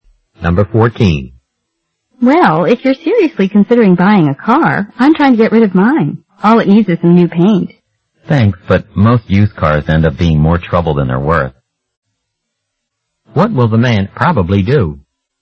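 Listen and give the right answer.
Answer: Not buy the woman's used car.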